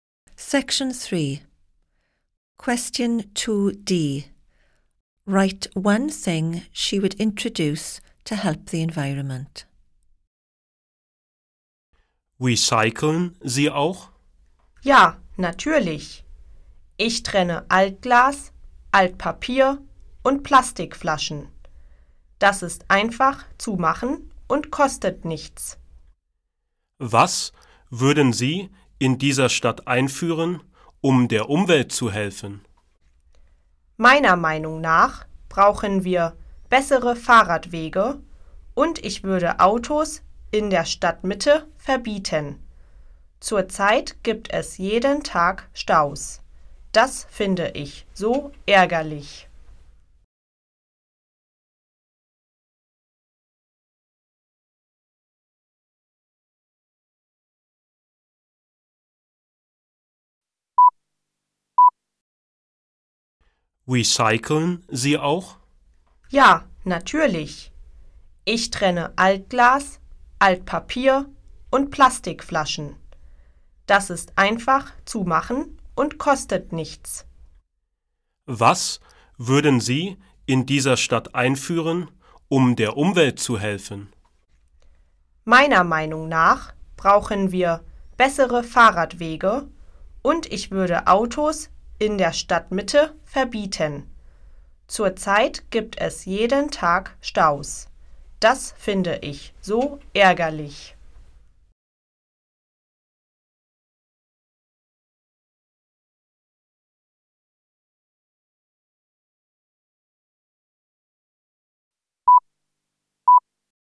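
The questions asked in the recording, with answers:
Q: Write one thing she would introduce to help the environment.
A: Better cycle paths or banning cars in the town centre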